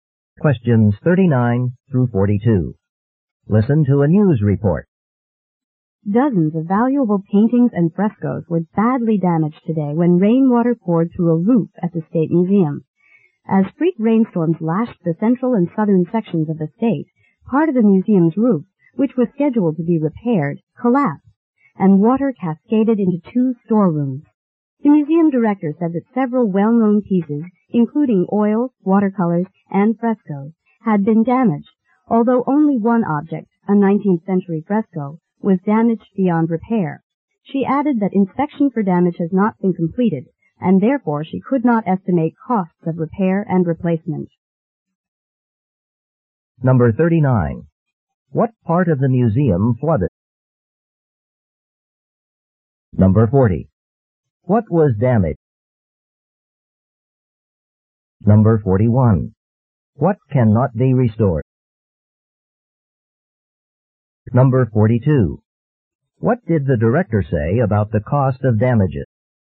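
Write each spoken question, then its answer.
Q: What part of the museum flooded?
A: Two storerooms

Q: What was damaged?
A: Paintings and frescoes

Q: What cannot be restored?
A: A 19th-century fresco

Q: What did the director say about the cost of damages?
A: She could not estimate it yet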